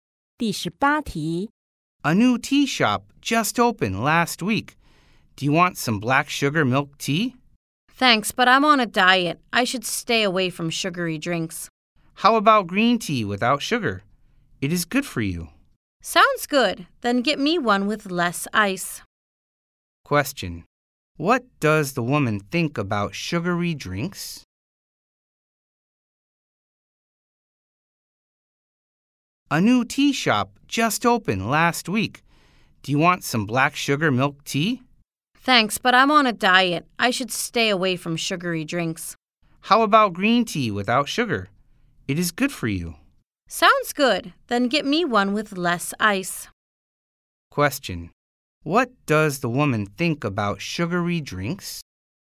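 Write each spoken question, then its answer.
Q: Question: what does the woman think about sugary drinks?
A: She should stay away from them because she's on a diet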